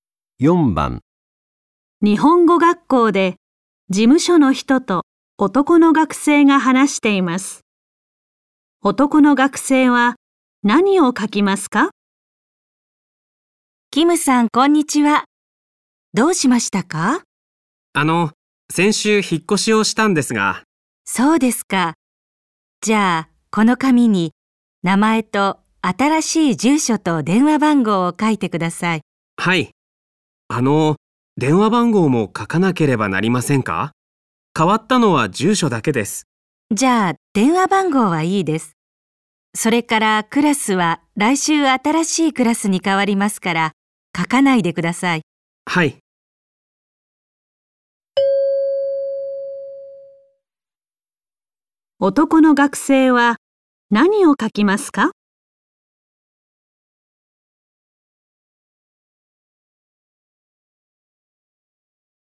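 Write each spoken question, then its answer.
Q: 男の学生は何を書きますか?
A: 名前と新しい住所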